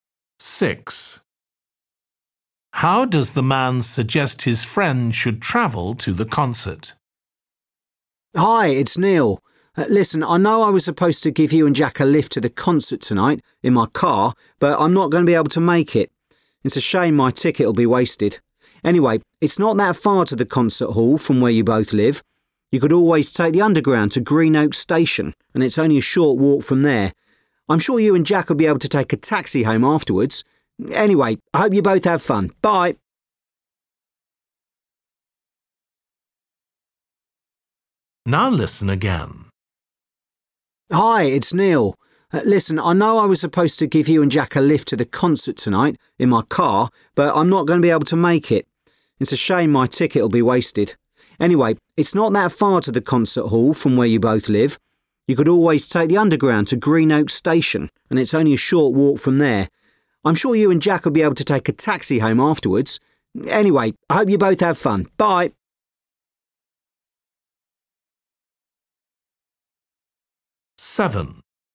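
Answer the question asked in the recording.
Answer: by underground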